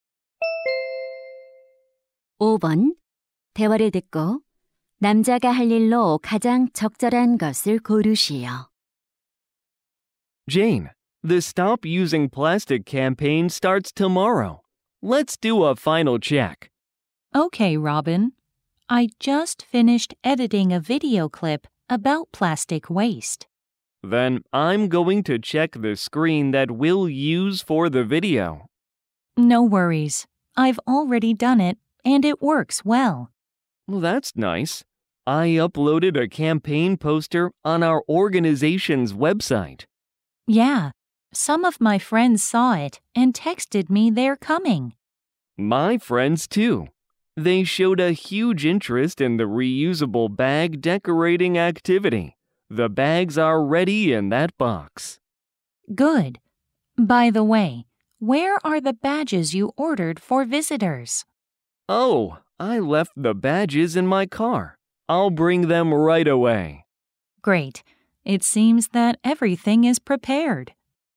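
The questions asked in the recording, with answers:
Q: 대화를 듣고 남자가 할 일로 가장 적절한 것을 고르시오.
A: 차에서 배지 가져오기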